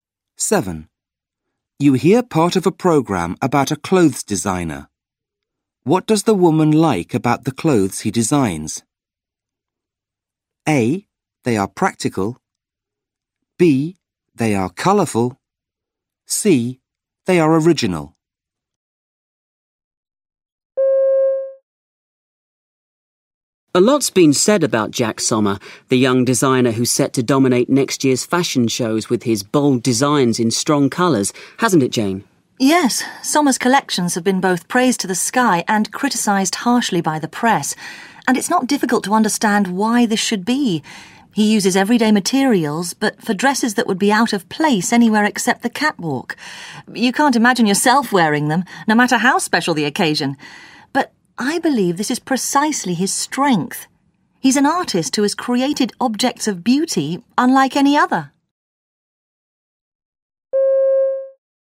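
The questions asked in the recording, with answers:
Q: What does the woman like about the clothes he designs?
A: C: They are original.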